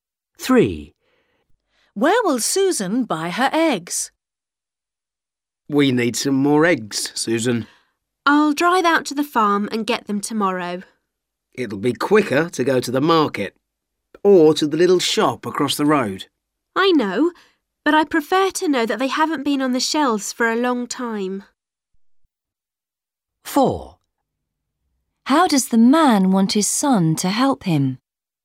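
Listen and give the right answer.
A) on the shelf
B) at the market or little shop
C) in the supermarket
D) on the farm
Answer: D) on the farm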